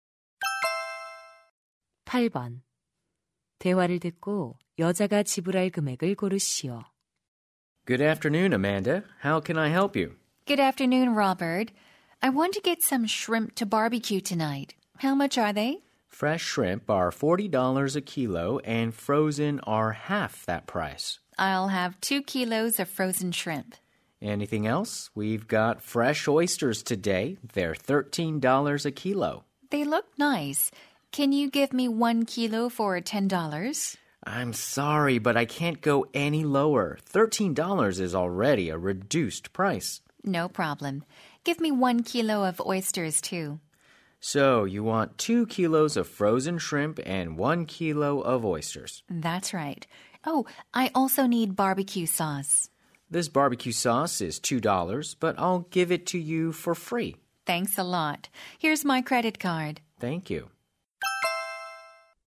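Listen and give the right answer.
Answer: 53달러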